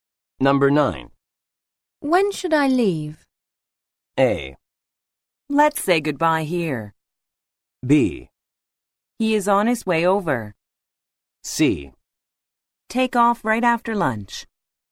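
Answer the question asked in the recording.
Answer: C: Take off right after lunch.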